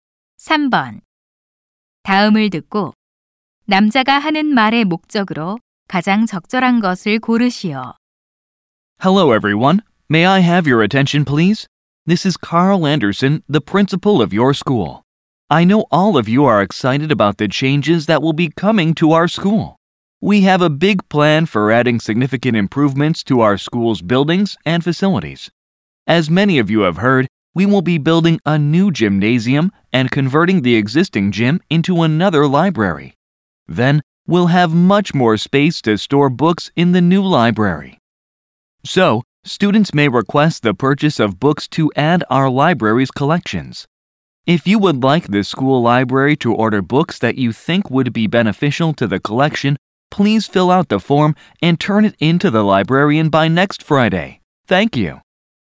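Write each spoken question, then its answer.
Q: 다음을 듣고 남자가 하는 말의 목적으로 가장 적절한 것을 고르시오.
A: 도서관에 추가할 도서 구입 신청을 요청하려고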